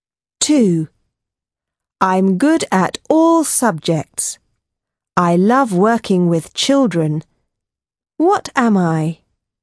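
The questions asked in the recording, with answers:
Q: What am I?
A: teacher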